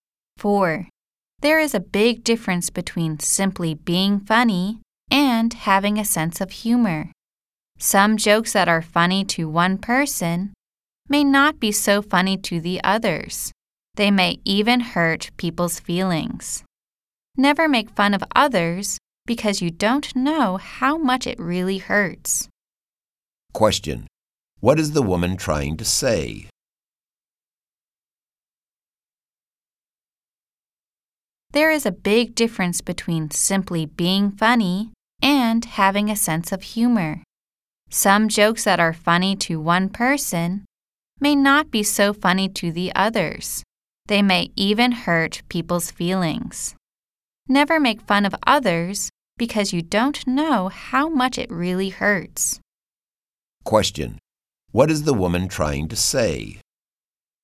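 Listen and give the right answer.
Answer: Never make fun of others; jokes may hurt people's feelings.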